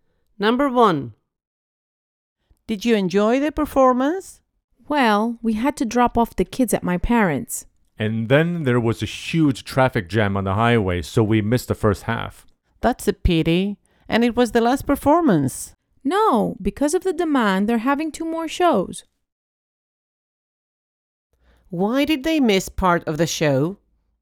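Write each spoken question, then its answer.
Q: Why did they miss part of the show?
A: There was a huge traffic jam on the highway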